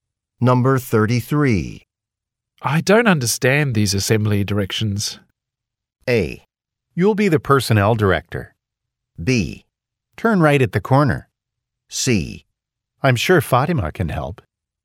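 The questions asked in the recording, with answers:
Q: I don't understand these assembly directions.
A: C: I'm sure Fatima can help.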